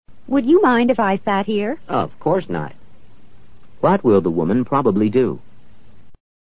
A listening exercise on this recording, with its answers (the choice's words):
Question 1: What will the woman probably do?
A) Look for another seat.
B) Repeat the question.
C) Remain standing.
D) Sit down.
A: Sit down.

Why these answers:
would you mind if... 多用于询问别人是否介意。不介意时一般回答no, not at all 或no, of course not等。这样回答的含义是"请照办"。